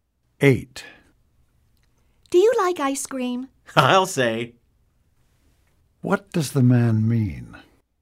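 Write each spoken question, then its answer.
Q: What does the man mean?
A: He really likes ice cream.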